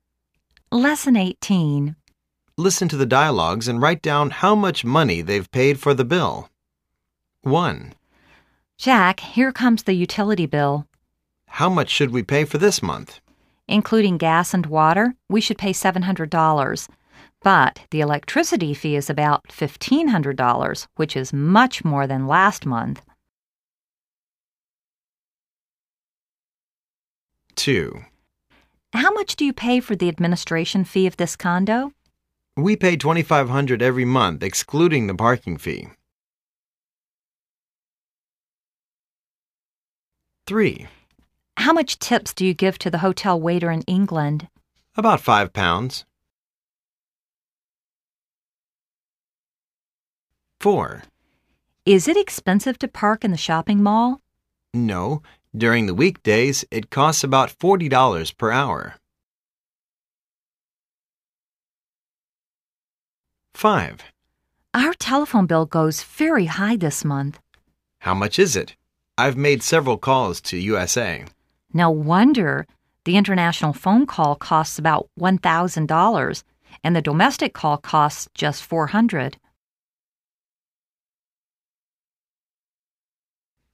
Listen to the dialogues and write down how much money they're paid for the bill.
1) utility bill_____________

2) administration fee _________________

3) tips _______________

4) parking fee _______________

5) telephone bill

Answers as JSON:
{"1": "2200 dollars", "2": "$2500", "3": "5 pounds", "4": "40 dollars", "5": "$1400"}